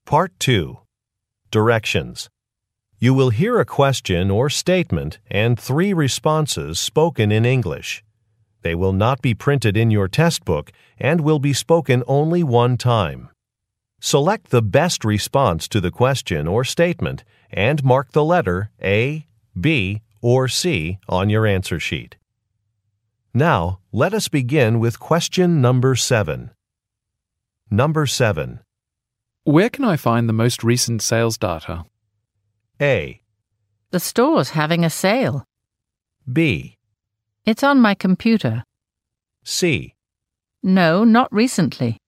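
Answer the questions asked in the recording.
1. It's on my computer.
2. B. It's on my computer.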